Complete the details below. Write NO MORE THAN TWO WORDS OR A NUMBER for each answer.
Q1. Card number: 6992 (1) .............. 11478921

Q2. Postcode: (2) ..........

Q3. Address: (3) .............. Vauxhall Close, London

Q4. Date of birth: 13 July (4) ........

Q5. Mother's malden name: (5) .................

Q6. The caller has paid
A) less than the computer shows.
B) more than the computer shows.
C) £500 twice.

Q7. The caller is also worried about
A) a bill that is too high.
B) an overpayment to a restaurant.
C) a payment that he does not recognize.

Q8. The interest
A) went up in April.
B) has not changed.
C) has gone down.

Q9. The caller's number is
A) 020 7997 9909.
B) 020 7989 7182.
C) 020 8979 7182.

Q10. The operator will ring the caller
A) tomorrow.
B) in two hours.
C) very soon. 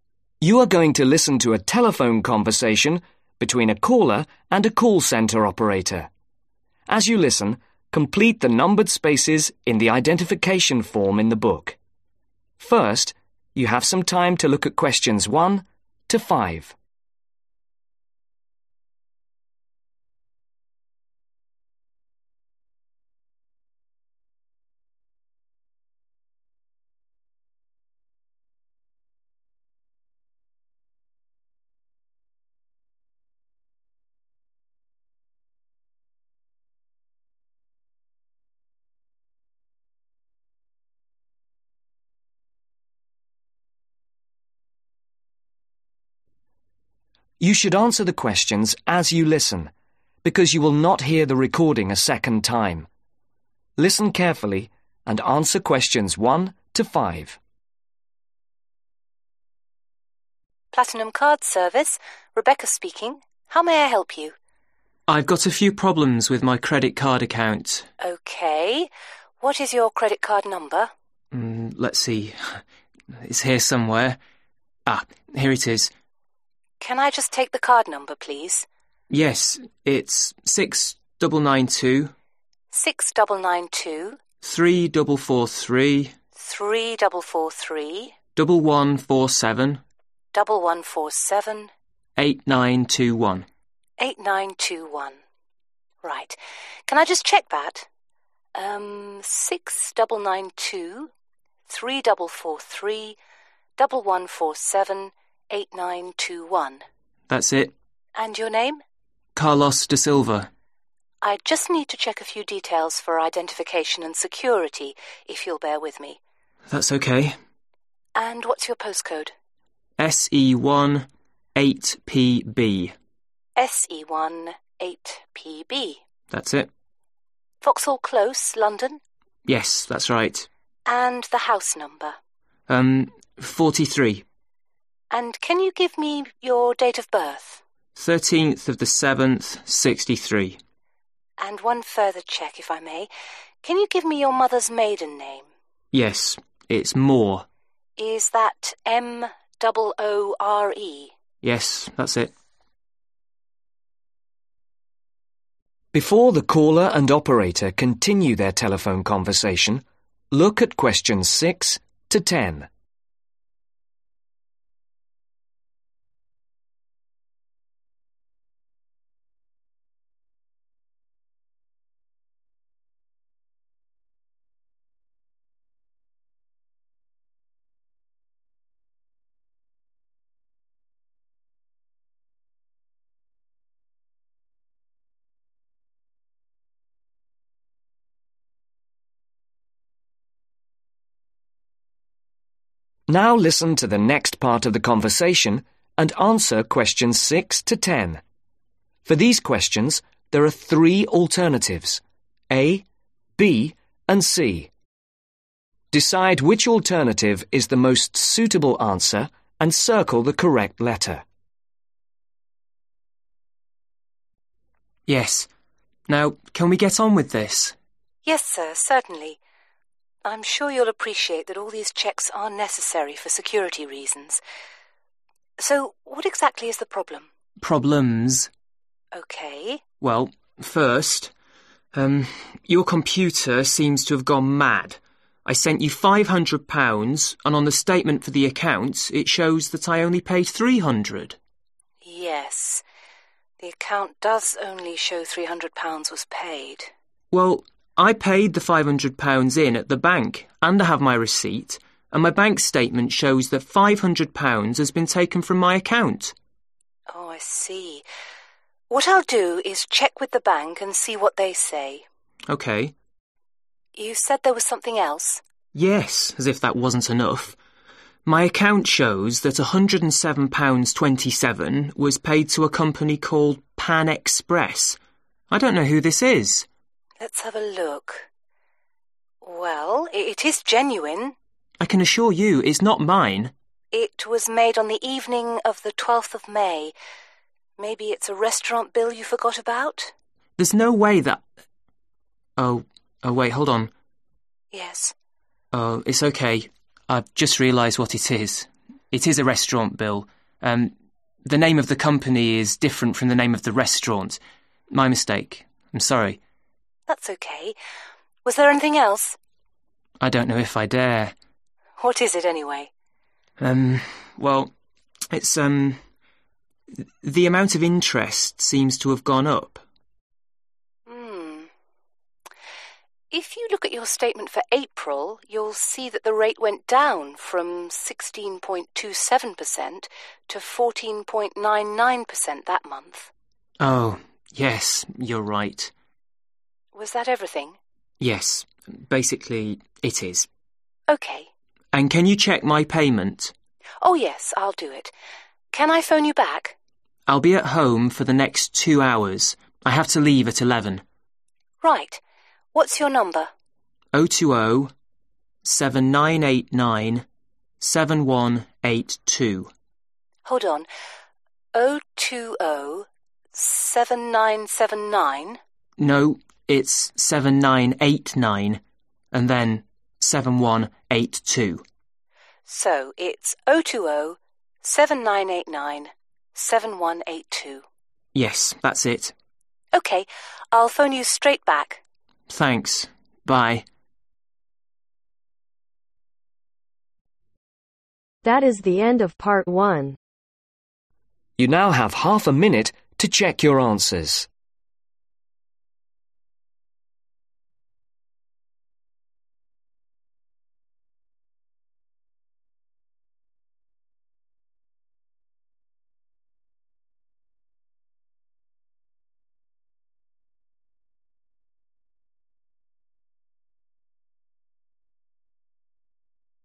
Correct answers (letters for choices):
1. 3443
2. SE1 8PB
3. 43
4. 1963
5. MOORE
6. B
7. C
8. C
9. B
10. C